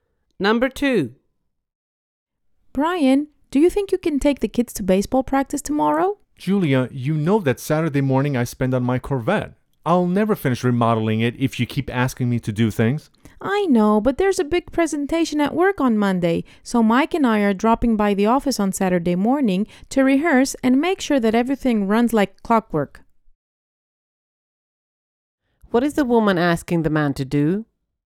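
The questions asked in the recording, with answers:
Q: What is the woman asking the man to do?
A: Take the kids to baseball practice on Saturday morning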